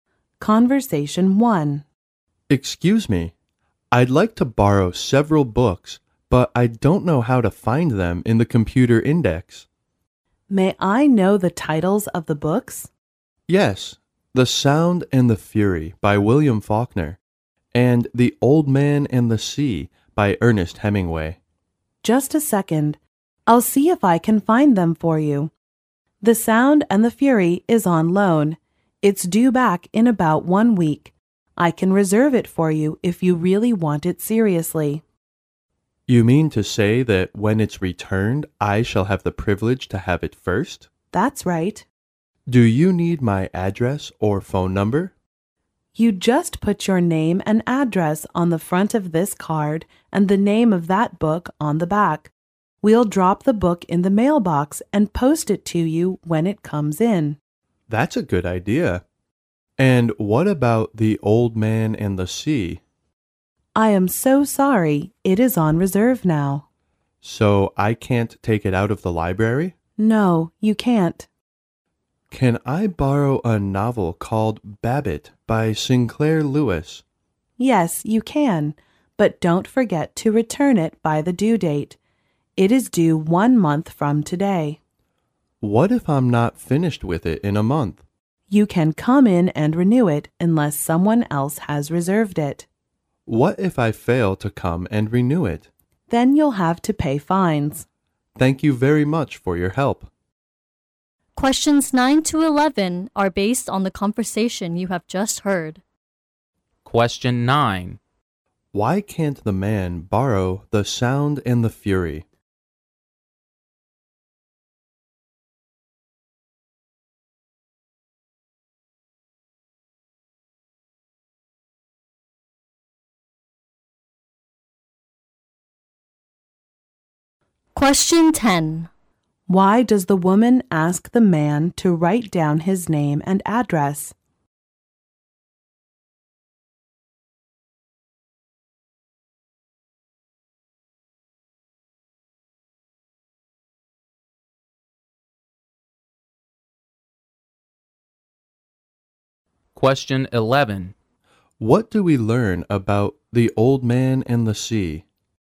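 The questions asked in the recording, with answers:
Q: Why can't the man borrow The Sound and the Fury?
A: It is on loan

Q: Why does the woman ask the man to write down his name and address?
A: To mail the book to him when it's returned

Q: What do we learn about the old man and the sea?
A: It is on reserve and can't be taken out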